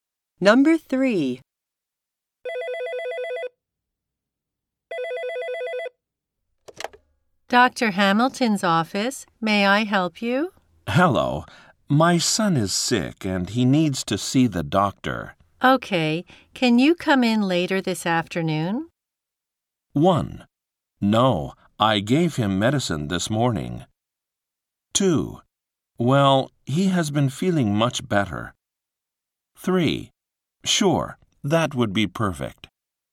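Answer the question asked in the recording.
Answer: 3: Sure, that would be perfect.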